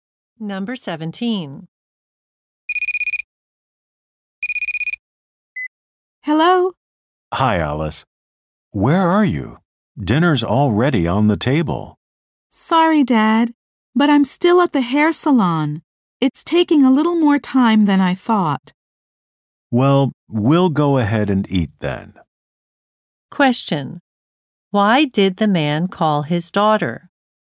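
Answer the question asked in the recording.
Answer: To tell her dinner was ready.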